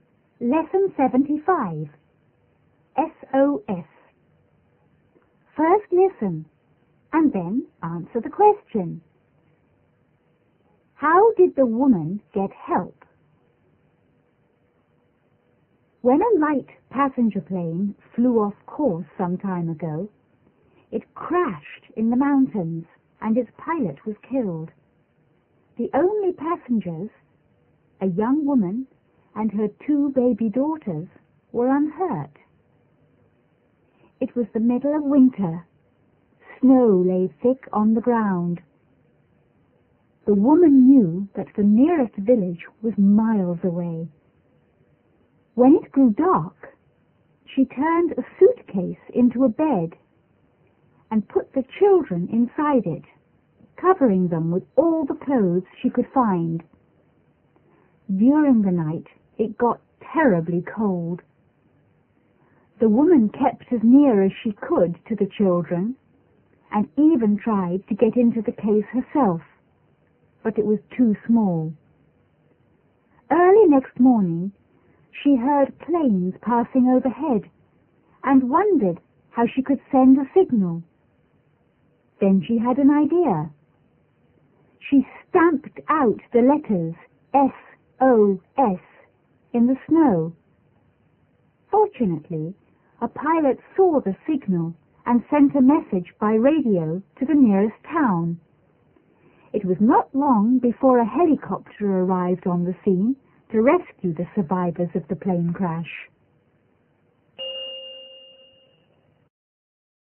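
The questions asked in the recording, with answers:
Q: How did the woman get help?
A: She stamped out the letters SOS in the snow, and a pilot saw the signal and radioed for help.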